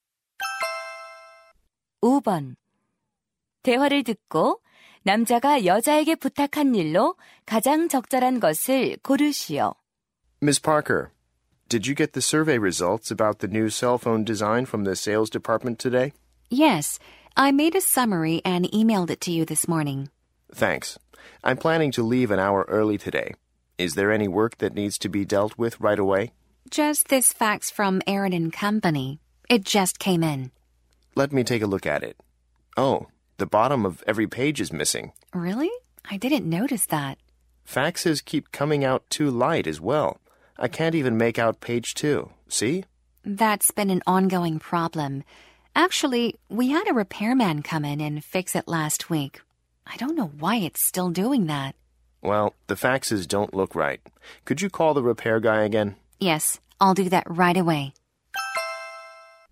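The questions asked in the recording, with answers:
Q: 대화를 듣고 남자가 여자에게 부탁한 일로 가장 적절한 것을 고르시오.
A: 수리 기사에게 다시 전화하기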